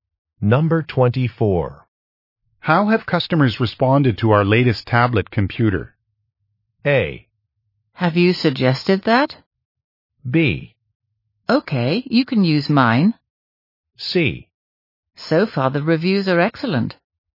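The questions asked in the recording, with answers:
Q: How have customers responded to our latest tablet computer?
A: C: So far the reviews are excellent.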